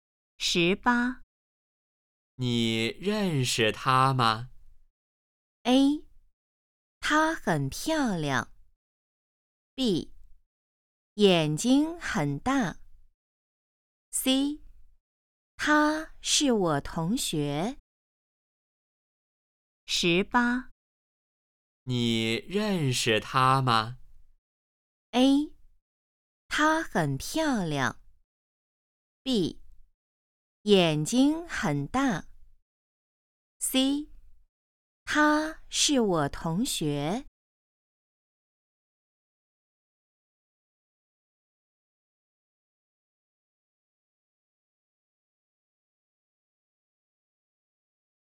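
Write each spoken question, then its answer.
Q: 你认识她吗?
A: C: 他是我同学。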